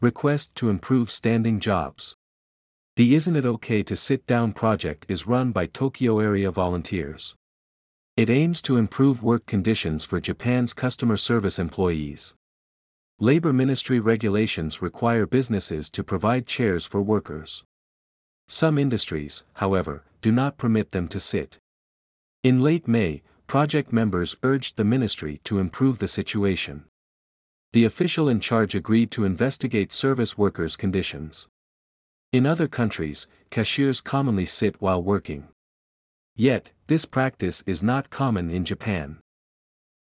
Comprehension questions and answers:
英語ニュースの音声を聞き、各空欄に入る英文を正確に書き取ってください。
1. Labor ministry regulations ( ) for workers.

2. Some industries, however, ( ).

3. In late May, project members ( ).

「誰が(Who)」「何をしたのか(What)」「なぜ(Why)」の答えを探しながら聞きましょう。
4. 誰が(Who)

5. 何をしたのか(What)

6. なぜ(Why)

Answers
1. require businesses to provide chairs
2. do not permit them to sit
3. urged the ministry to improve the situation
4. 「座ってちゃダメですか」プロジェクトのメンバーが
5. 厚労省に接客業従業員の労働条件を改善するよう求めた。
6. 中には、彼らが座ることを許可していない業界もあるため。

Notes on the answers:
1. 主な不正解事例) ▶「require businesses」を過去形の「required businesses」と書いてしまった。 ⇒ 過去の出来事ではなく、現在も有効な規則についての説明です。
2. 主な不正解事例) ▶「permit them to sit」の目的語を飛ばして「permit to sit」と書いてしまった。 ⇒ 「permit(許可する)」は他動詞なので目的語が必要です。
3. 主な不正解事例) ▶過去形の「urged」を現在形の「urge」と書いてしまった。 ⇒ この部分はプロジェクト・メンバーが取った行動を表しているため、過去形にしないと意味が通りません。

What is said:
Request to Improve Standing Jobs
The "Isn't it OK to sit down?" project is run by Tokyo-area volunteers.
It aims to improve work conditions for Japan's customer service employees.
Labor ministry regulations require businesses to provide chairs for workers.
Some industries, however, do not permit them to sit.
In late May, project members urged the ministry to improve the situation.
The official in charge agreed to investigate service workers' conditions.
In other countries, cashiers commonly sit while working.
Yet, this practice is not common in Japan.

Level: B1(英検2級)